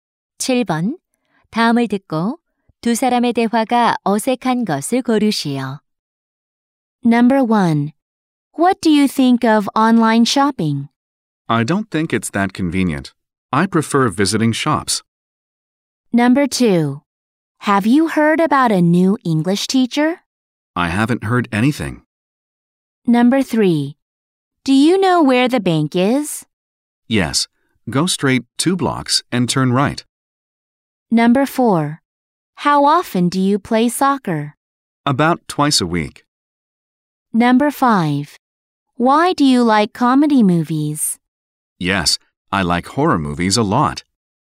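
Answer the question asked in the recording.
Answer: 5: Why do you like comedy movies? / Yes, I like horror movies a lot.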